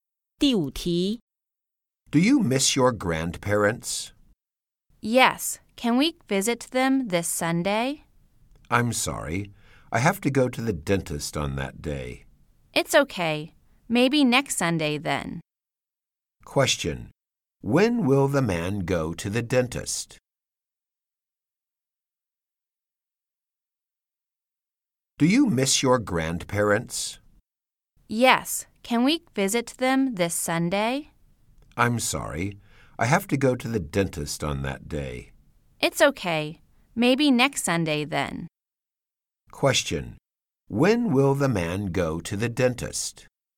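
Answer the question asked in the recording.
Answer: This Sunday.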